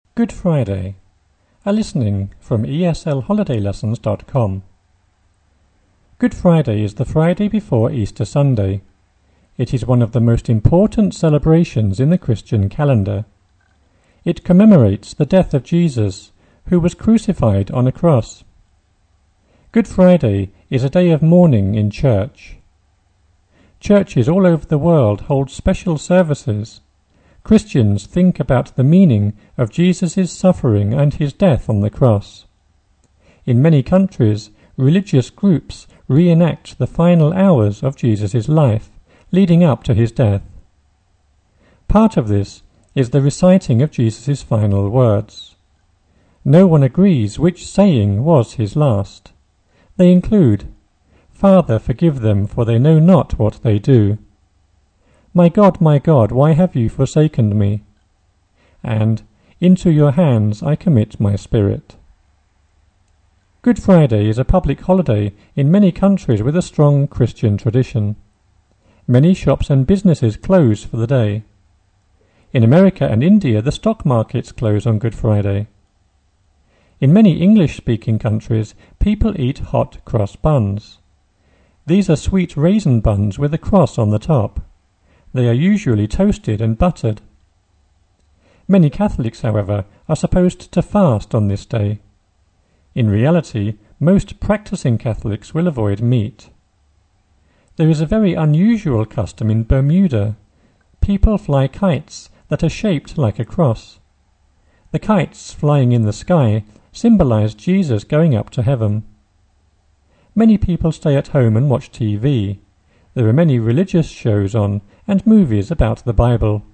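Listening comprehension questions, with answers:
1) It _______________ important celebrations in the Christian calendar.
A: is one of the most

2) It commemorates the death of Jesus, who _______________ cross.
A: was crucified on a

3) Christians think about the meaning of Jesus' _______________ death on the cross.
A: suffering and his

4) In many countries, religious groups re-enact the final hours of Jesus' life, _______________ death.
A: leading up to his

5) No one _______________ was his last.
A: agrees which saying

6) "Into your hands _______________."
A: I commit my spirit

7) Good Friday is a public holiday in _________________ a strong Christian tradition.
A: many countries with

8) In America and India, the _________________ Good Friday.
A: stock markets close on

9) These are sweet raisin buns _________________ top.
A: with a cross on the

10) In reality, most practicing Catholics _______________.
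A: will avoid meat

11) People fly kites that are _______________.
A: shaped like a cross

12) There are many _______________, and movies about the Bible.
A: religious shows on

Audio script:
Good Friday is the Friday before Easter Sunday. It is one of the most important celebrations in the Christian calendar. It commemorates the death of Jesus, who was crucified on a cross. Good Friday is a day of mourning in church. Churches all over the world hold special services. Christians think about the meaning of Jesus' suffering and his death on the cross. In many countries, religious groups re-enact the final hours of Jesus' life, leading up to his death. Part of this is the reciting of Jesus' final words. No one agrees which saying was his last. They include "Father forgive them, for they know not what they do", "My God, my God, why have you forsaken me?" and "Into your hands I commit my spirit."
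They include "Father forgive them, for they no / know not what they do", "My God, my God, why have you forsaken me?" and "Into your hands I commit my spirit."
Good Friday is a public / publicly holiday in many countries with a strong Christian tradition. Many shops and businesses closed / close for the day. In America and India, the stock markets close on Good Friday. In many English-speaking countries / country, people eat hot-cross buns. These are sweet raisin buns with a cross / crossed on the top. They are usually toasted and buttered. Many Catholics, however, are supposed to slow / fast on this day. In reality, most practicing Catholics will avoid meet / meat. There is a very unusual custom in Bermuda. People fly kites that are shaped like a cross. The kites flying in the sky symbolize / symbolic Jesus going up to heaven.
The kites flying in the sky symbolize Jesus going up to heaven. 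Many people stay
at home and watch TV. There are many religious shows on, and movies about the Bible.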